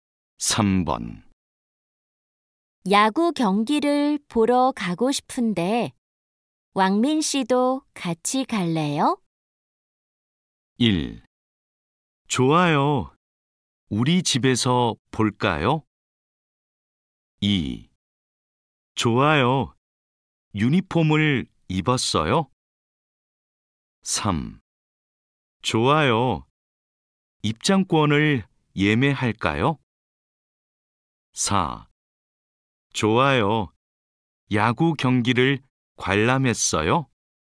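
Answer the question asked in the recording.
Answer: 3: 좋아요. 입장권을 예매할까요?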